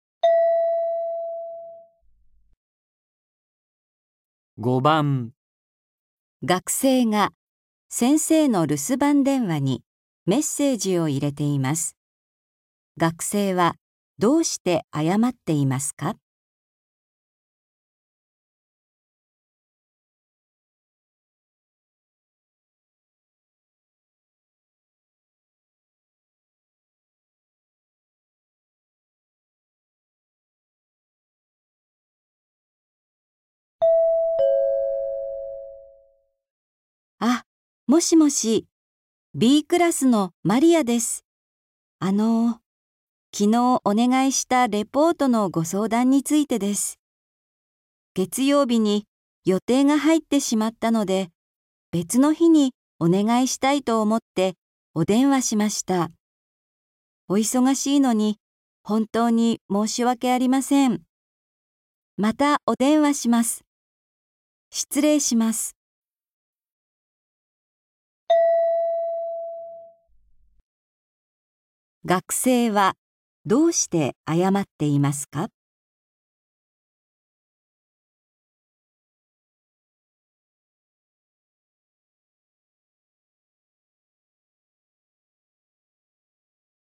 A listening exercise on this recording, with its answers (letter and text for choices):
学生はどうして謝っていますか。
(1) レポートが遅れるから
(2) また電話をかけるから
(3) 先生と約束した日を変えたいから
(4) 先生が忙しいのに電話をかけたから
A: (3) 先生と約束した日を変えたいから

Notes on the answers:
月曜日に予定が入ってしまったので、別の日にお願いしたいと思ってお電話しました。

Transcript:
F:あ、もしもし。あのう、昨日お願いしたレポートのご相談についてです。月曜日に予定が入ってしまったので、別の日にお願いしたいと思ってお電話しました。お忙しいのに、本当に申し訳ありません。失礼します。

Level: 初級